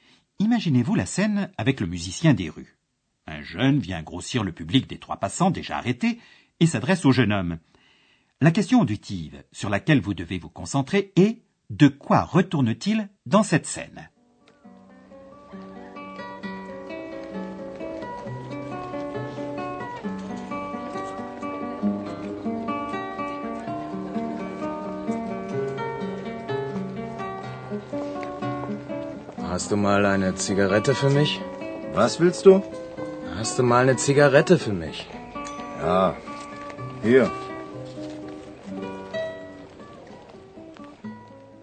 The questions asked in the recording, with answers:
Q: De quoi retourne-t-il dans cette scène ?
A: Dans cette scène, un jeune aimerait bien une cigarette.